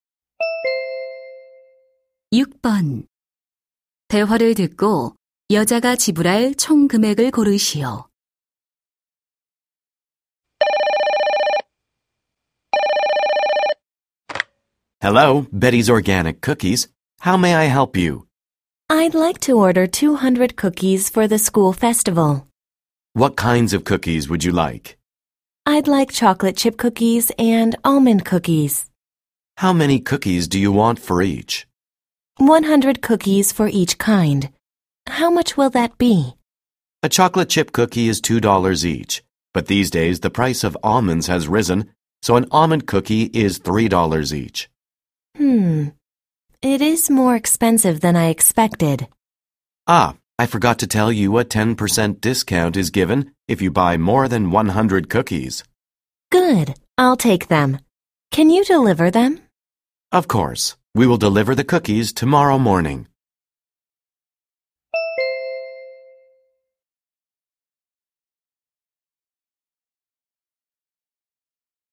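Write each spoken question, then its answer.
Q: 대화를 듣고 여자가 지불할 총 금액을 고르시오.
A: $450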